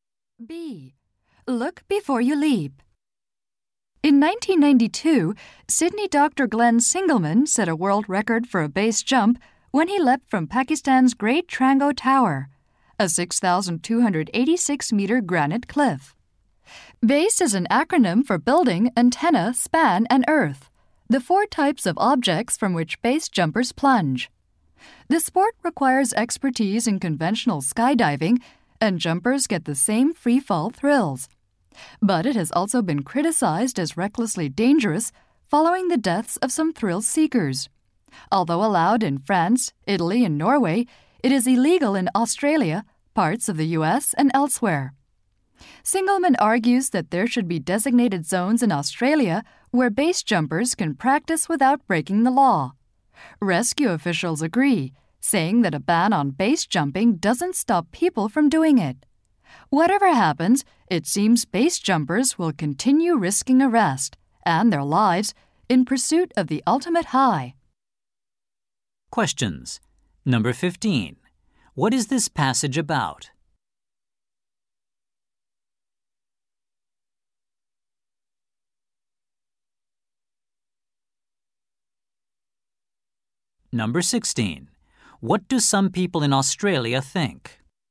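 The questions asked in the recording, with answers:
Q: What is this passage about?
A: Base jumping, a dangerous sport

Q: What do some people in Australia think?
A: There should be designated zones where base jumping is legal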